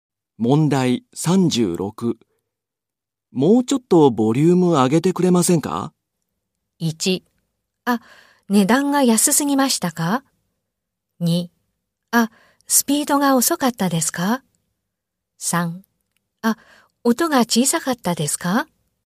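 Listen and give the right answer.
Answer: 3: あ、音が小さかったですか?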